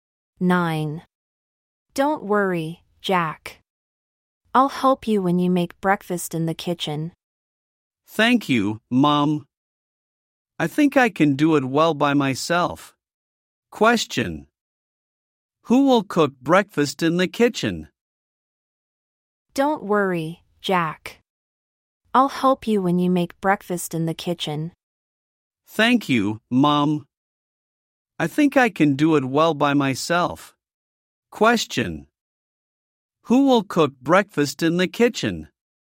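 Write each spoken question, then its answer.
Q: Who will cook breakfast in the kitchen?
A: Jack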